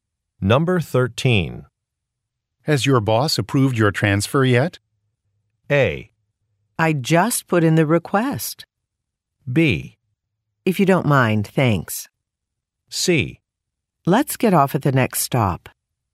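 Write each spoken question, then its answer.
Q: Has your boss approved your transfer yet?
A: A: I just put in the request.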